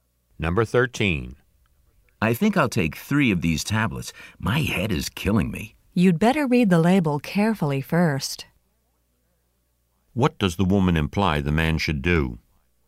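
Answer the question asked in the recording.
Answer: Read the label carefully before taking the tablets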